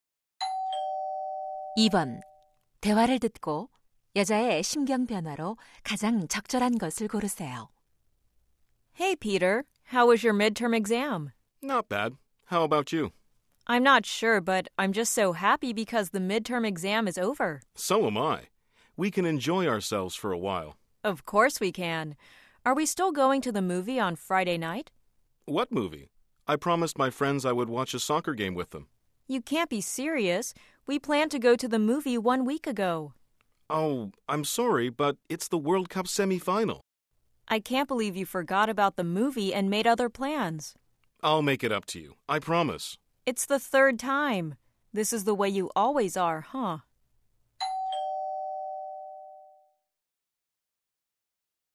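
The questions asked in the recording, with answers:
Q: 대화를 듣고 여자의 심경 변화로 가장 적절한 것을 고르세요.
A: 기쁨에서 실망/화남으로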